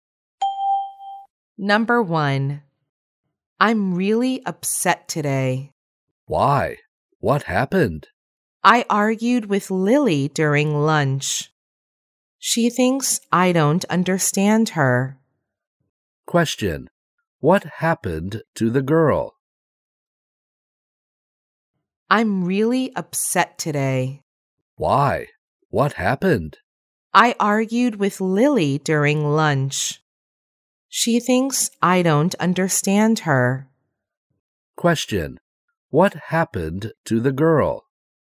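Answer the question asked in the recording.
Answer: She argued with Lily during lunch.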